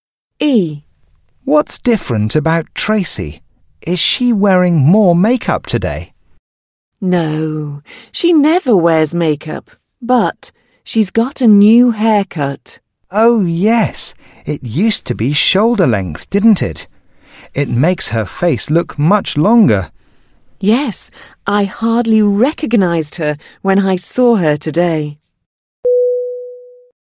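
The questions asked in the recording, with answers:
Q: What's different about Tracy?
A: She has a new haircut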